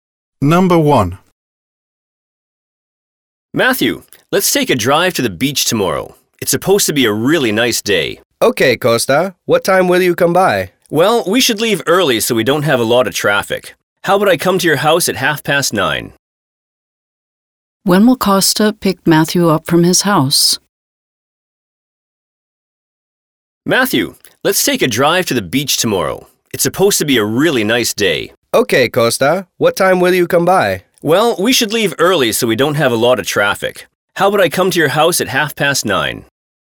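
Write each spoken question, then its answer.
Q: When will Costa pick Matthew up from his house?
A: At 9:30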